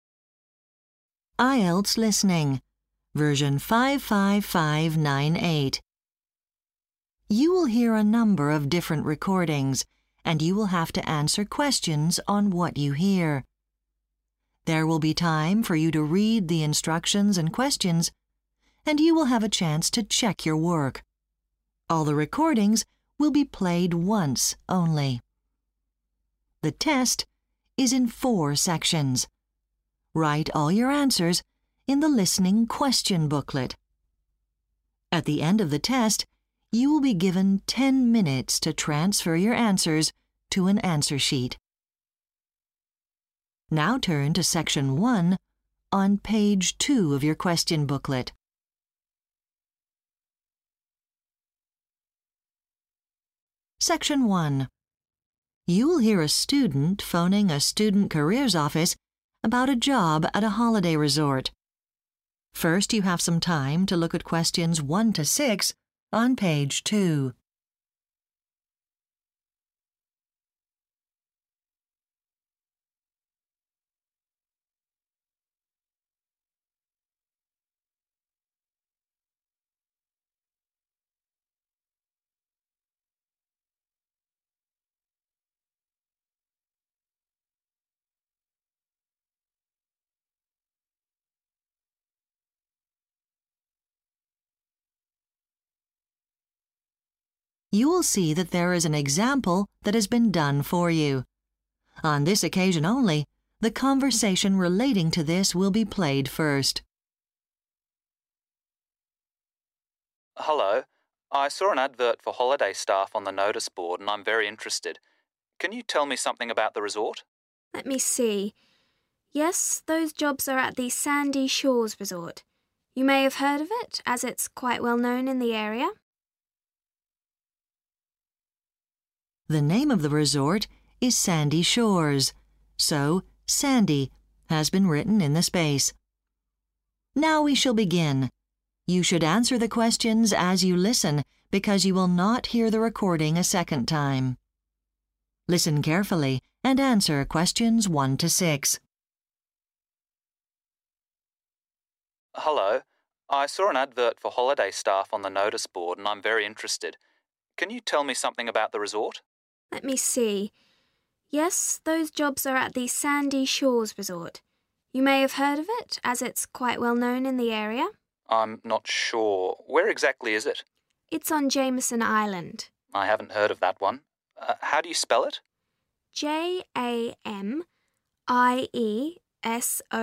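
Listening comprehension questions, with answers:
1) Location: 1__________ island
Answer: Jamieson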